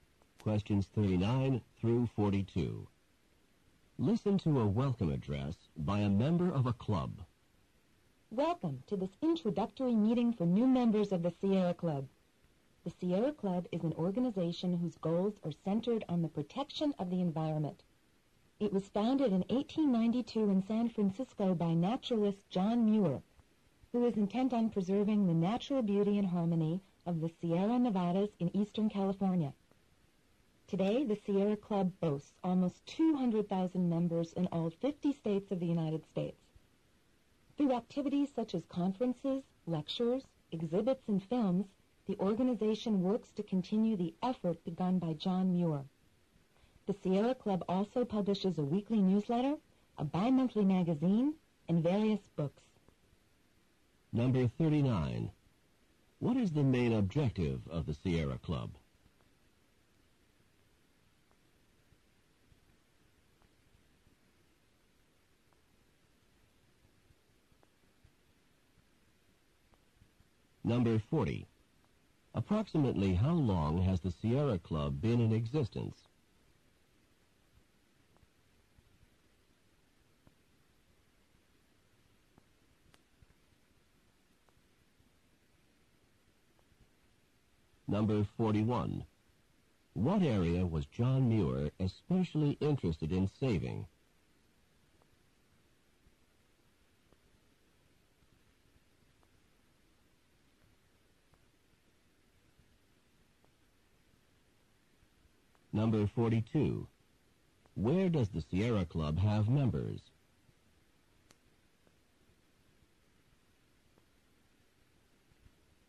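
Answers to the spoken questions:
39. To protect the environment
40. Since 1892 (over a century)
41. The Sierra Nevadas in Eastern California
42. In all 50 states of the United States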